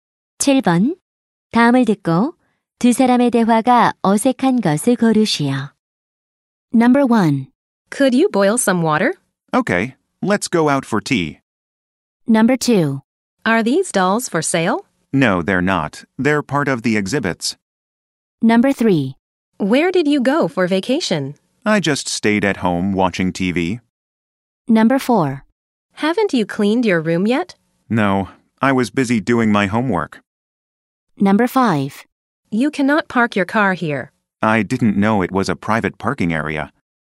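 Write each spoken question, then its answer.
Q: 다음을 듣고 두 사람의 대화가 어색한 것을 고르시오.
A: 1번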